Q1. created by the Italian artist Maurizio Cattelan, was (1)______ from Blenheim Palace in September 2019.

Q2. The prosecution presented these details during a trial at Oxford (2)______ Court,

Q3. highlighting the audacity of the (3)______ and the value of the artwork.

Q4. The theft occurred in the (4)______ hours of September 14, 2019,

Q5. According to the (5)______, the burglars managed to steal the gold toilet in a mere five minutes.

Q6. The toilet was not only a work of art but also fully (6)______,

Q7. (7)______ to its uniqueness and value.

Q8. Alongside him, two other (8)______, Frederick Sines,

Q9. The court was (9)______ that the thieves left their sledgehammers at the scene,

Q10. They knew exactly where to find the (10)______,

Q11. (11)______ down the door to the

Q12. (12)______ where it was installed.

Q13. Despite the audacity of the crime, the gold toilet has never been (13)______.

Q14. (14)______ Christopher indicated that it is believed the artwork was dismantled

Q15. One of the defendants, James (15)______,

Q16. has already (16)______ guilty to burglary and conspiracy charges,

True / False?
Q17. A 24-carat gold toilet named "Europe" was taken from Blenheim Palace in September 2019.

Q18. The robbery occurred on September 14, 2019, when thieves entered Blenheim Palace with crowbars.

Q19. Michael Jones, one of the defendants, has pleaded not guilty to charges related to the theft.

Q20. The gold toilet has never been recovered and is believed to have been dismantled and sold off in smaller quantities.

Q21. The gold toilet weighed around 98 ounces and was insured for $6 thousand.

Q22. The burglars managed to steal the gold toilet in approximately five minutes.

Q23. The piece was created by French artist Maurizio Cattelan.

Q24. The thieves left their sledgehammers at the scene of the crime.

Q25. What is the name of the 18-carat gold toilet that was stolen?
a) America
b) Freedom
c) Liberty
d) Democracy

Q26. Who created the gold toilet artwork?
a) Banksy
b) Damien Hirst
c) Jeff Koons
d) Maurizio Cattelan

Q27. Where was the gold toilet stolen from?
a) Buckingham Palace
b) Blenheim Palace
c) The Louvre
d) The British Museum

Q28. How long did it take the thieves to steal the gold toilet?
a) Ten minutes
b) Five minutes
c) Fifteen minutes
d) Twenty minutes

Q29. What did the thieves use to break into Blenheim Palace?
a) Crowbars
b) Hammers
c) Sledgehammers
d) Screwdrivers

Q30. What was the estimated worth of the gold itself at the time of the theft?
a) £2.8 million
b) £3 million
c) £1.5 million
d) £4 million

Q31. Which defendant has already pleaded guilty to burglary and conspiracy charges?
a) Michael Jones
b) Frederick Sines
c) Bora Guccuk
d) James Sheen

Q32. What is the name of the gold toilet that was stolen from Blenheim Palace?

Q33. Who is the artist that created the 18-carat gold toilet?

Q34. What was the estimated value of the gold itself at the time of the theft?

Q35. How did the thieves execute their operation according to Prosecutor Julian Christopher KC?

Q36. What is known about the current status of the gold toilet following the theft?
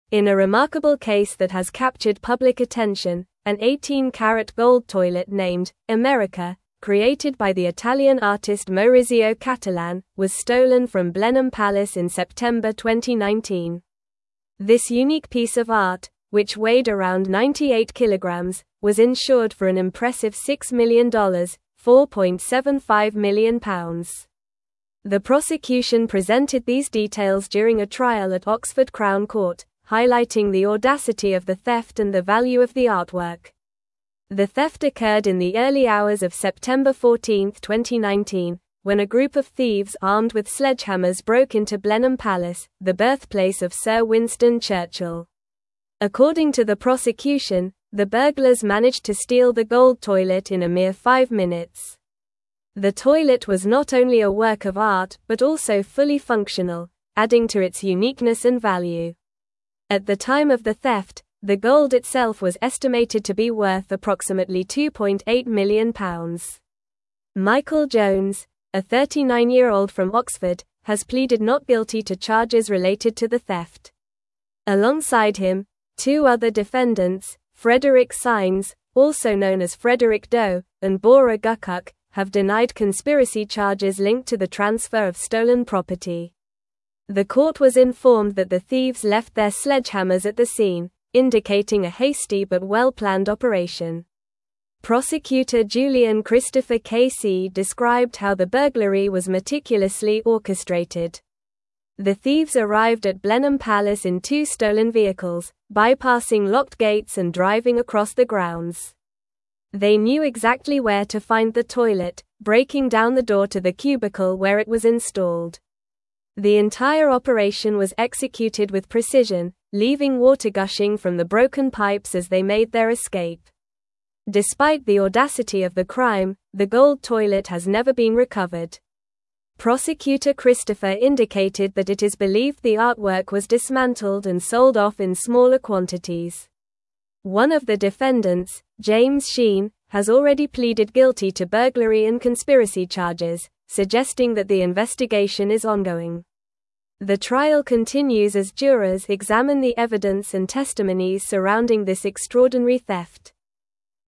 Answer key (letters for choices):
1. stolen
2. Crown
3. theft
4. early
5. prosecution
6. functional
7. adding
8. defendants
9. informed
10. toilet
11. breaking
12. cubicle
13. recovered
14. Prosecutor
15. Sheen
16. pleaded
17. False
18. False
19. True
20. True
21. False
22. True
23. False
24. True
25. a
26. d
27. b
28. b
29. c
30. a
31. d
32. The name of the gold toilet that was stolen is "America."
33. The artist who created the 18-carat gold toilet is Maurizio Cattelan.
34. The estimated value of the gold itself at the time of the theft was approximately £2.8 million.
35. The thieves executed their operation with precision, knowing exactly where to find the toilet, breaking down the door to the cubicle, and leaving water gushing from broken pipes as they escaped.
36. The gold toilet has never been recovered, and it is believed that it was dismantled and sold off in smaller quantities.

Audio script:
In a remarkable case that has captured public attention, an 18-carat gold toilet named "America," created by the Italian artist Maurizio Cattelan, was stolen from Blenheim Palace in September 2019. This unique piece of art, which weighed around 98 kilograms, was insured for an impressive $6 million (£4.75 million). The prosecution presented these details during a trial at Oxford Crown Court, highlighting the audacity of the theft and the value of the artwork.
The theft occurred in the early hours of September 14, 2019, when a group of thieves armed with sledgehammers broke into Blenheim Palace, the birthplace of Sir Winston Churchill. According to the prosecution, the burglars managed to steal the gold toilet in a mere five minutes. The toilet was not only a work of art but also fully functional, adding to its uniqueness and value. At the time of the theft, the gold itself was estimated to be worth approximately £2.8 million.
Michael Jones, a 39-year-old from Oxford, has pleaded not guilty to charges related to the theft. Alongside him, two other defendants, Frederick Sines, also known as Frederick Doe, and Bora Guccuk, have denied conspiracy charges linked to the transfer of stolen property. The court was informed that the thieves left their sledgehammers at the scene, indicating a hasty but well-planned operation.
Prosecutor Julian Christopher KC described how the burglary was meticulously orchestrated. The thieves arrived at Blenheim Palace in two stolen vehicles, bypassing locked gates and driving across the grounds. They knew exactly where to find the toilet, breaking down the door to the cubicle where it was installed. The entire operation was executed with precision, leaving water gushing from the broken pipes as they made their escape.
Despite the audacity of the crime, the gold toilet has never been recovered. Prosecutor Christopher indicated that it is believed the artwork was dismantled and sold off in smaller quantities. One of the defendants, James Sheen, has already pleaded guilty to burglary and conspiracy charges, suggesting that the investigation is ongoing. The trial continues as jurors examine the evidence and testimonies surrounding this extraordinary theft.

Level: Level 4